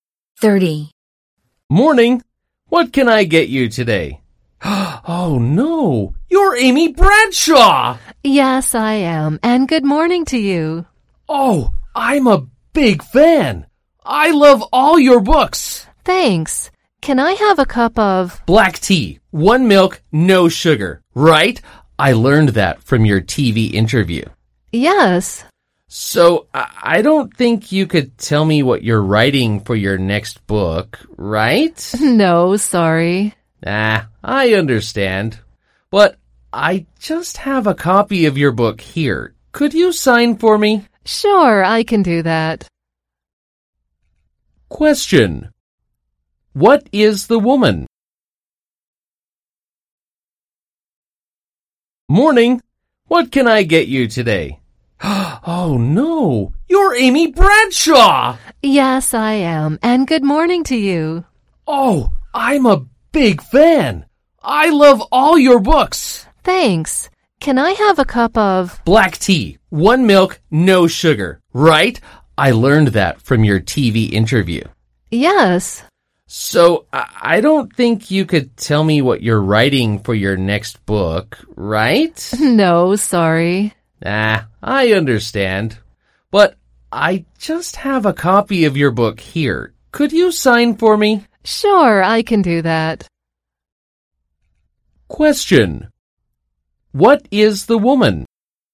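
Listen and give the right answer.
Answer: A writer.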